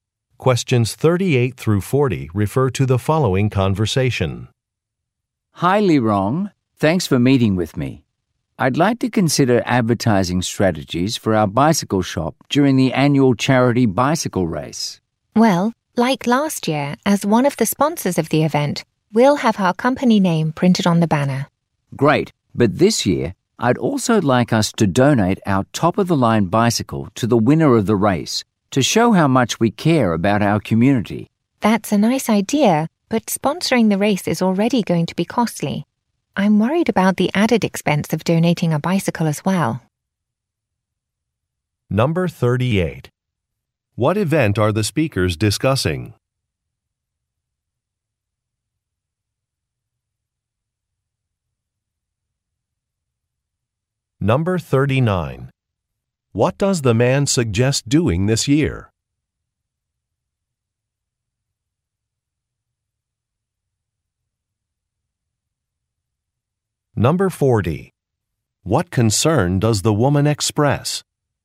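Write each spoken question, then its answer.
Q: What event are the speakers discussing?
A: An annual charity bicycle race

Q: What does the man suggest doing this year?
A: Donating a top-of-the-line bicycle to the race winner

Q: What concern does the woman express?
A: The added cost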